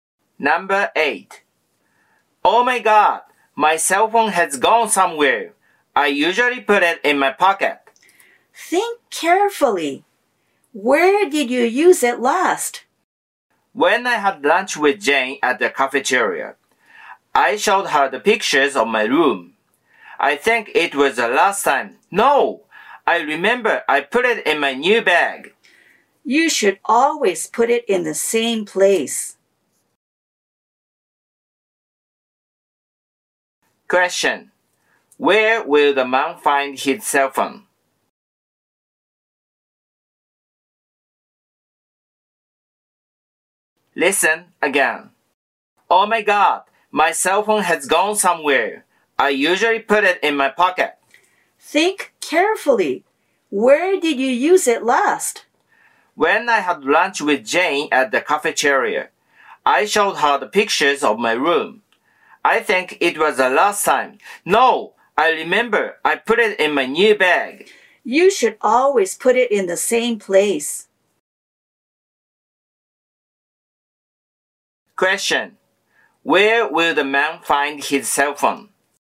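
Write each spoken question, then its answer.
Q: Where will the man find his cell phone?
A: In his new bag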